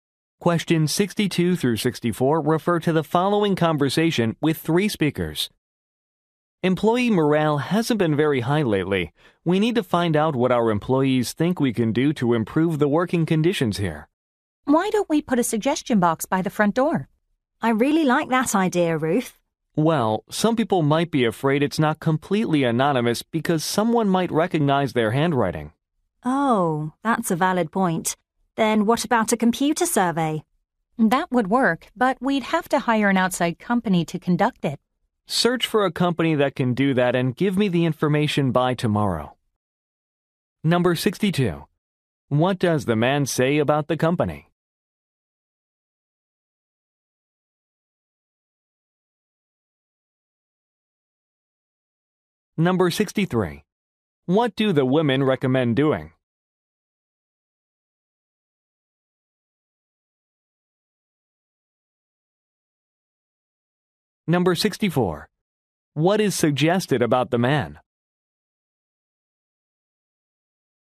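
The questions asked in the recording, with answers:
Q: What does the man say about the company?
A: Employee morale is low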